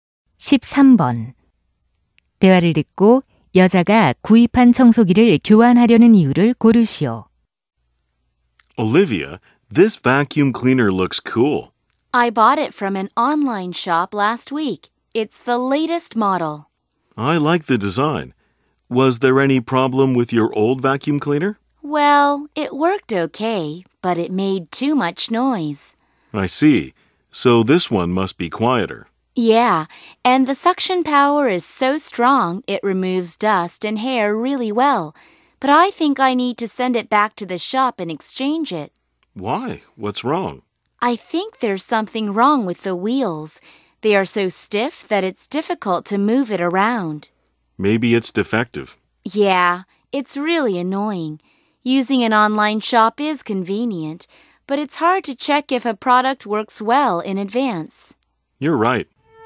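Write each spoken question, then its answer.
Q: 대화를 듣고 여자가 구입한 청소기를 교환하려는 이유를 고르시오.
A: 바퀴가 뻑뻑해서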